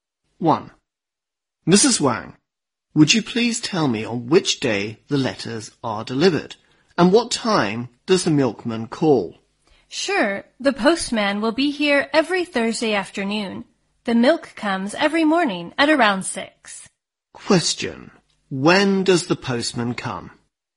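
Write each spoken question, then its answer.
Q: When does the postman come?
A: Every Thursday afternoon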